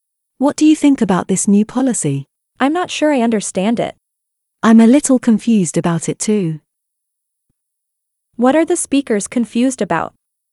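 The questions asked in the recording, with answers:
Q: What are the speakers confused about?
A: The new policy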